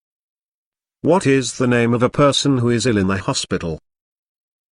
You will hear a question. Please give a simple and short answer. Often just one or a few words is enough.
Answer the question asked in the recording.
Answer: Patient